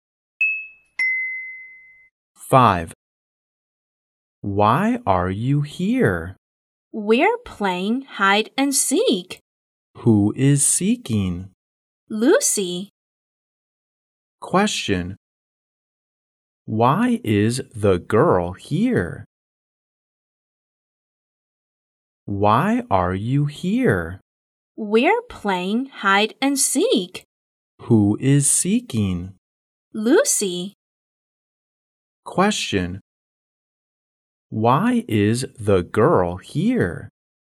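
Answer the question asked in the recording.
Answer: They are playing hide and seek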